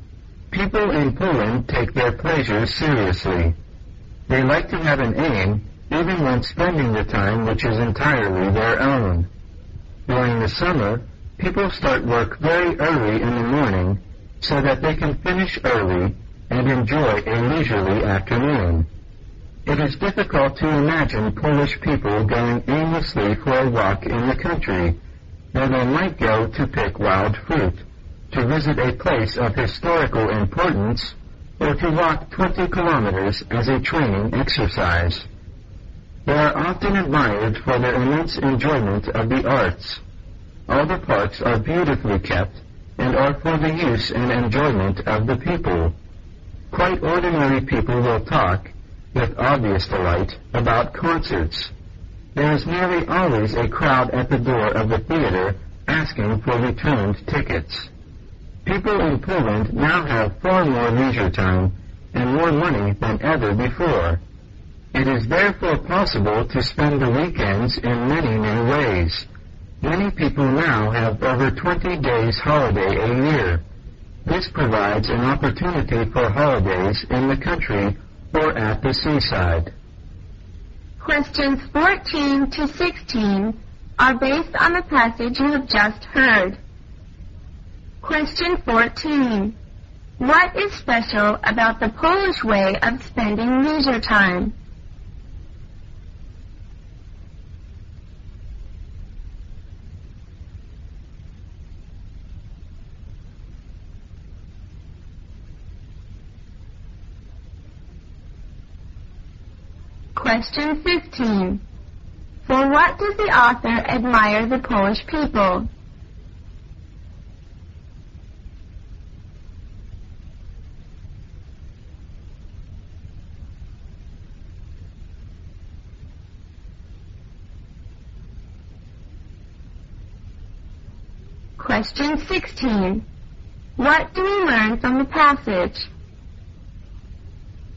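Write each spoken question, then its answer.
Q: What is special about the Polish way of spending leisure time?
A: They like to have an aim even in their free time

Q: For what does the author admire the Polish people?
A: Their immense enjoyment of the arts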